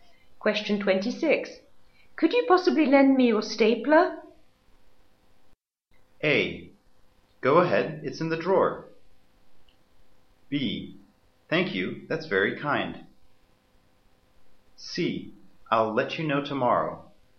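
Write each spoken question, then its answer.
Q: Could you possibly lend me your stapler?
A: A: Go ahead, it's in the drawer.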